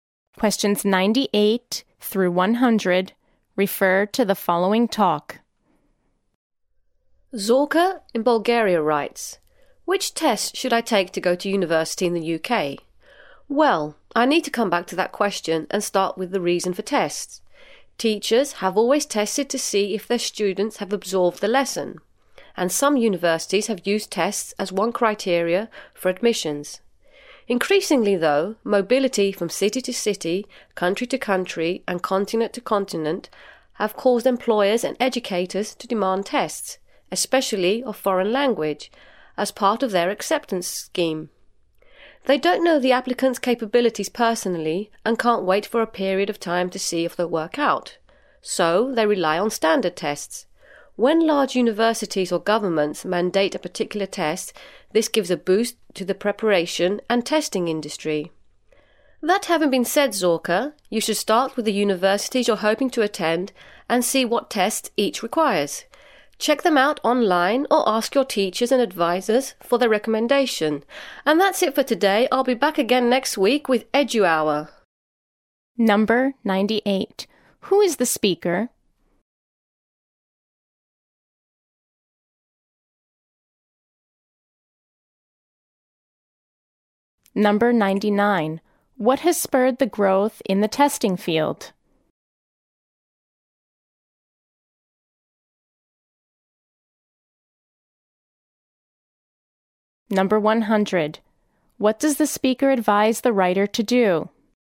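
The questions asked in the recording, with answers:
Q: What does the speaker advise the writer to do?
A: Check which tests the universities she hopes to attend require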